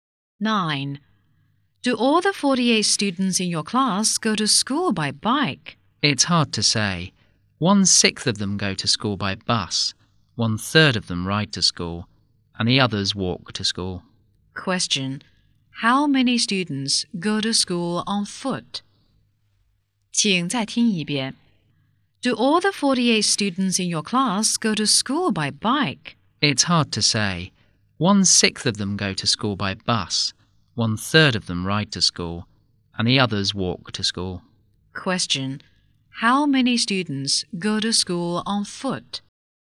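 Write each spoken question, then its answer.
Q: How many students go to school on foot?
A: 24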